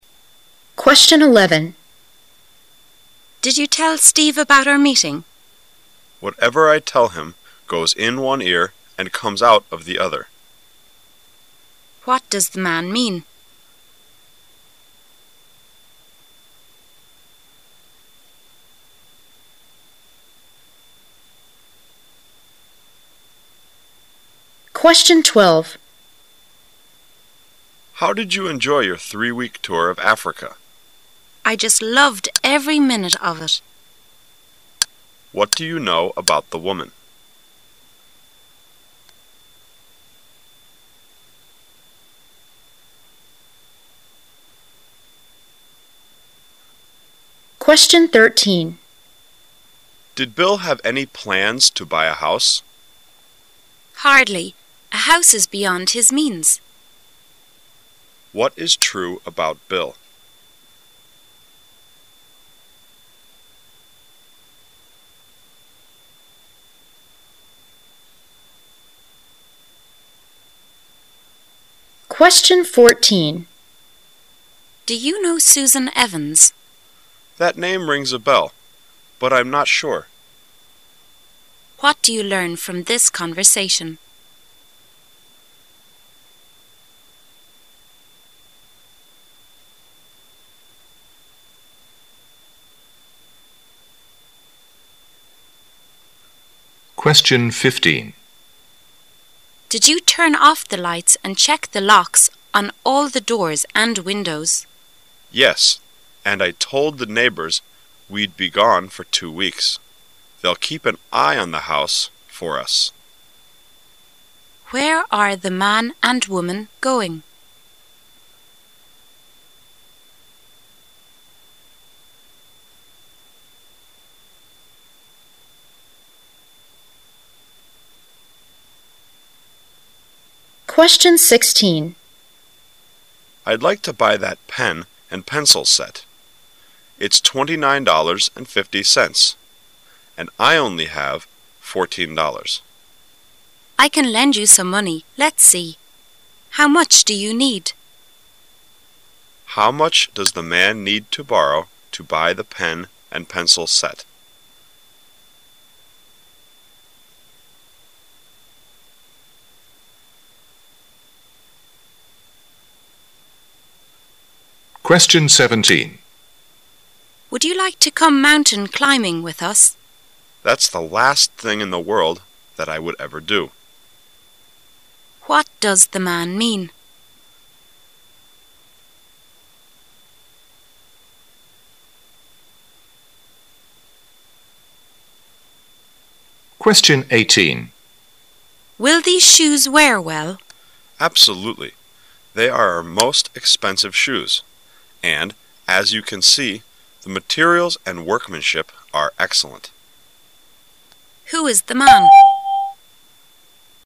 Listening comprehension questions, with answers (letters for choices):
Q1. What do you know about the woman?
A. She loved the people in Africa.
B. She loved the tour in some places.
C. Three weeks is just like a few minutes.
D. The whole tour is quite interesting.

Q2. What is true about Bill?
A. Bill cannot afford a house.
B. Bill decided to buy a house.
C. Bill doesn't mean to buy a house.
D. Bill goes beyond the house.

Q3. What do you learn from this conversation?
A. Susan Evans rings a bell.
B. The name sounds familiar to the man.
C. The man never heard of the name.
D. The man is not sure about the bell.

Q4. What does the man mean?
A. He went mountain climbing last year.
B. He hasn't traveled around the world yet.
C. He'd like to climb that mountain.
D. He definitely does not want to go.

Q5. Who is the man?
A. The woman's doctor.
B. The woman's husband.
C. A shoe buyer.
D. A shoe salesman.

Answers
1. D
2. A
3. B
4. D
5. D

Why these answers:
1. M: How did you enjoy your three-week tour of Africa? W: I just loved every minute of it. Q: What do you know about the woman?
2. M: Did Bill have any plans to buy a house? W: Hardly. A house is beyond his means. Q: What is true about Bill?
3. W: Do you know Susan Evans? M: That name rings a bell, but I'm not sure. Q: What do you learn from this conversation?
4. W: Would you like to come mountain climbing with us? M: That's the last thing in the world that I would ever do. Q: What does the man mean?
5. W: Will these shoes wear well? M: Absolutely. They are our most expensive shoes, and as you can see, the materials and workmanship are excellent. Q: Who is the man?